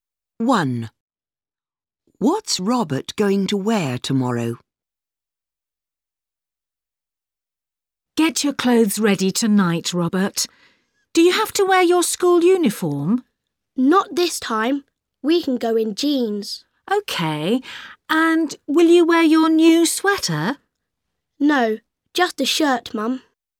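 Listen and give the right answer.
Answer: Jeans and a shirt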